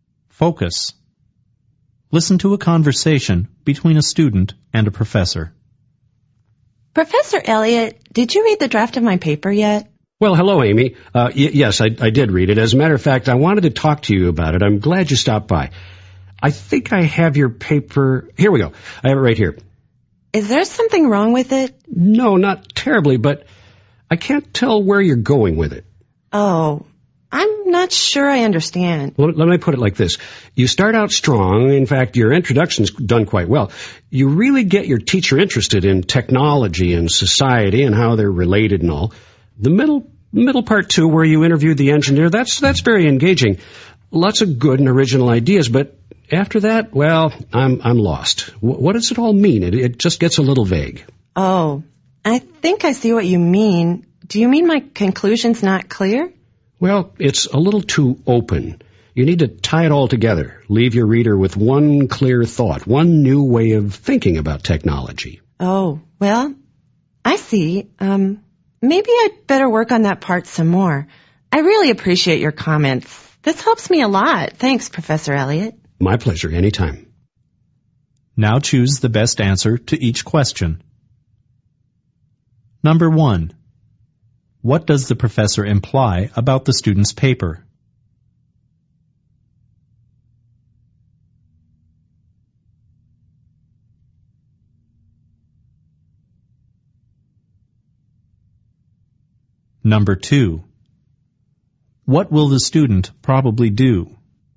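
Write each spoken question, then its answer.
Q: What does the professor imply about the student's paper?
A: The conclusion is not clear; it needs to tie everything together.

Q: What will the student probably do?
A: Revise the conclusion of her paper.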